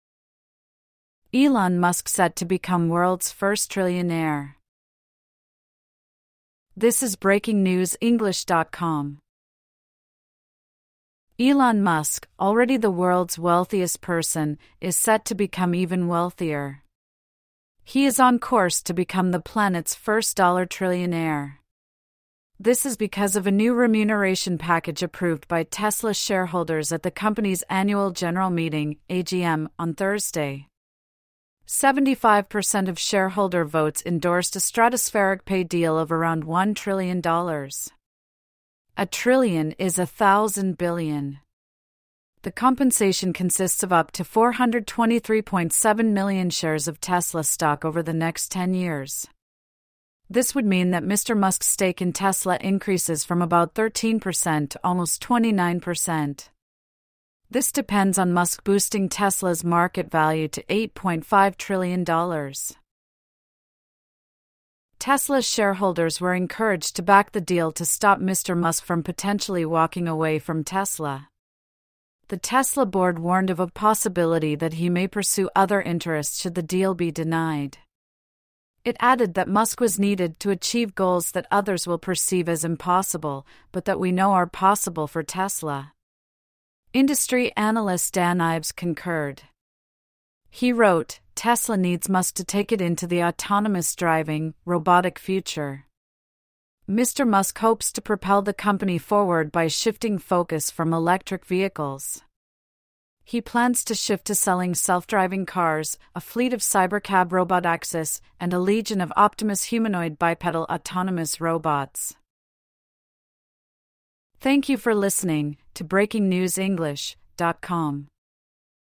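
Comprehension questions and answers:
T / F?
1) Elon Musk is currently the second-richest person in the world.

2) Tesla shareholders voted to give Mr Musk a huge remuneration package.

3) A trillion is a billion billion.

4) The pay deal will see Mr Musk take control of over a third of Tesla.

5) Tesla shareholders were encouraged to reject the pay deal.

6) The Tesla board believes that Musk can make the impossible possible.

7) An industry analyst said Tesla needs Mr Musk.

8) Tesla's new robotaxis will be called "Optimus".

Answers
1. F
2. T
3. F
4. F
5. F
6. T
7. T
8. F

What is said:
Elon Musk set to become world's first trillionaire
Elon Musk, already the world's wealthiest person, is set to become even wealthier. He is on course to become the planet's first dollar trillionaire. This is because of a new remuneration package approved by Tesla shareholders at the company's annual general meeting (AGM) on Thursday. 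Seventy-five per cent of shareholder votes endorsed a stratospheric pay deal of around $1 trillion. A trillion is a thousand billion. The compensation consists of up to 423.7 million shares of Tesla stock over the next 10 years. This would mean that Mr Musk's stake in Tesla increases from about 13 per cent to almost 29 per cent. This depends on Musk boosting Tesla's market value to $8.5 trillion.
Tesla shareholders were encouraged to back the deal to stop Mr Musk from potentially walking away from Tesla. The Tesla board warned of a "possibility that he may pursue other interests should [the deal] be denied". It added that Musk was needed "to achieve goals that others will perceive as impossible, but that we know are possible for Tesla". Industry analyst Dan Ives concurred. He wrote: "Tesla needs Musk to take it into the autonomous driving, robotic future." Mr Musk hopes to propel the company forward by shifting focus from electric vehicles. 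He plans to shift to selling self-driving cars, a fleet of "Cybercab" robotaxis, and a legion of "Optimus" humanoid bi-pedal autonomous robots.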